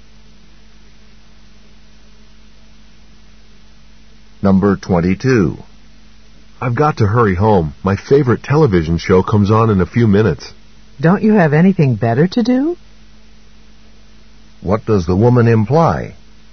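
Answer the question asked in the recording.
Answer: The man should spend his time on something better than TV.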